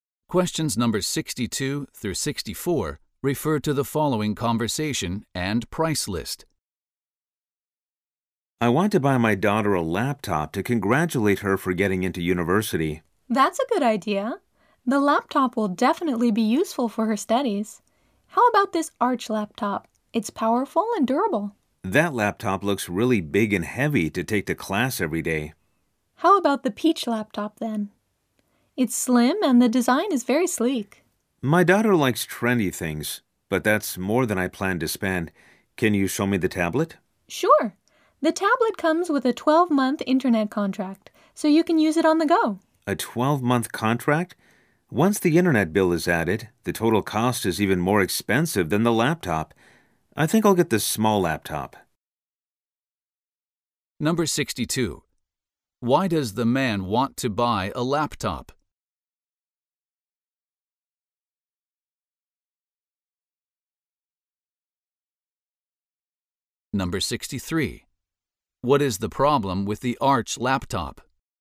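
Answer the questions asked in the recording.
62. To congratulate his daughter for getting into university
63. It is too big and heavy to take to class every day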